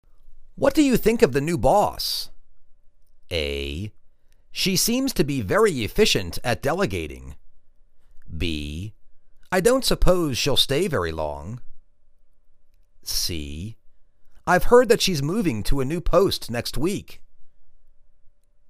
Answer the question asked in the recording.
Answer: She seems to be very efficient at delegating.